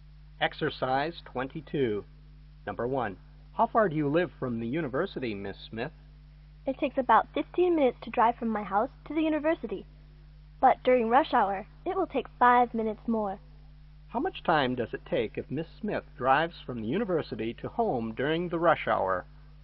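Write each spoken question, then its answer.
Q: How much time does it take if Miss Smith drives from the university to home during the rush hour?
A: 20 minutes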